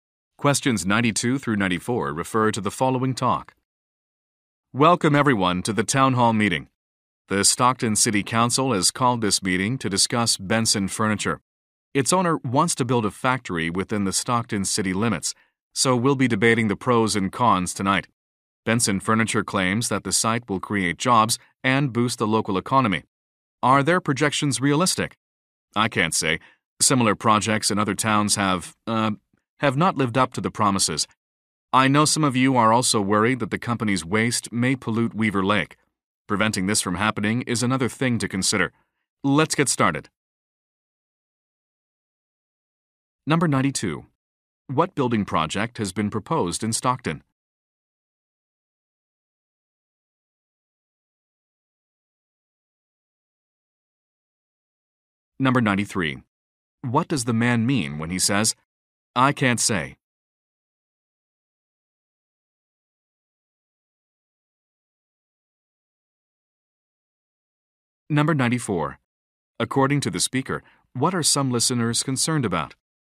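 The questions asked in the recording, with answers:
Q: What building project has been proposed in Stockton?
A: A furniture factory

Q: According to the speaker, what are some listeners concerned about?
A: Pollution of Weaver Lake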